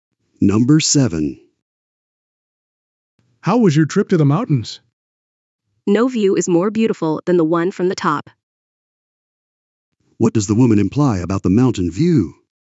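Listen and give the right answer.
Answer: The view from the top was the most beautiful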